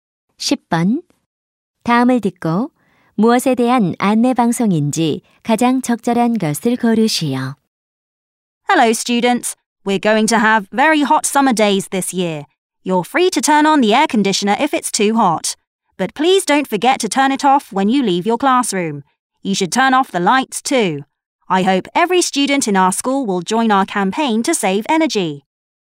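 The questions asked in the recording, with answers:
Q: 다음을 듣고 무엇에 대한 안내 방송인지 가장 적절한 것을 고르시오.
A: 에너지 절약 캠페인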